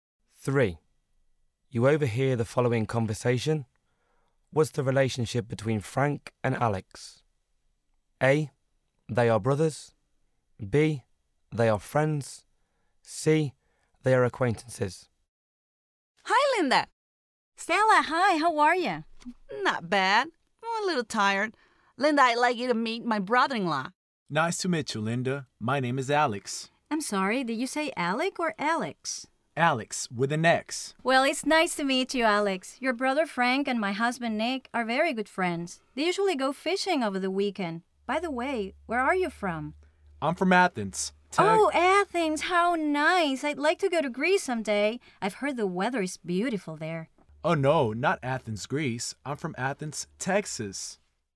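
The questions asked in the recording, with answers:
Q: What's the relationship between Frank and Alex?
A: A: They are brothers.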